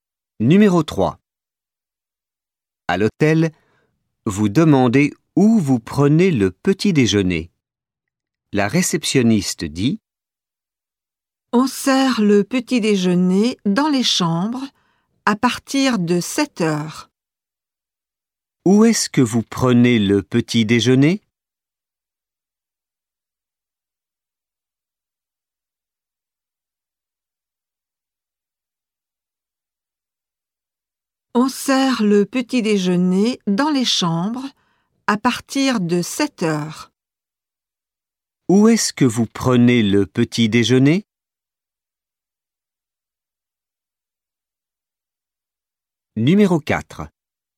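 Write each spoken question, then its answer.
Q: Où est-ce que vous prenez le petit déjeuner ?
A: Dans les chambres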